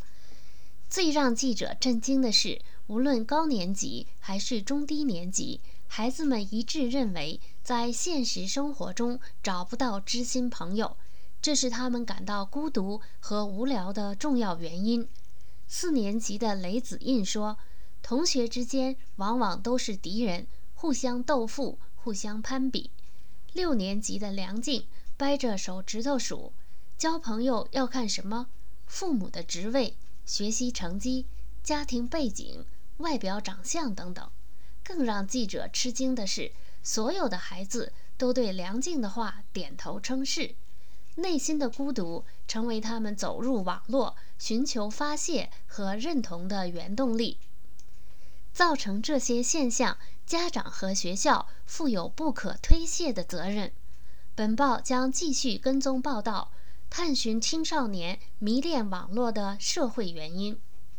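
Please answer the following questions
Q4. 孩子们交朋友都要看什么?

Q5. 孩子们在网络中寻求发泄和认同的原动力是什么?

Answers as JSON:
{"4": "父母的职位、学习成绩、家庭背景、外表长相等", "5": "内心的孤独"}

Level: 3rd Year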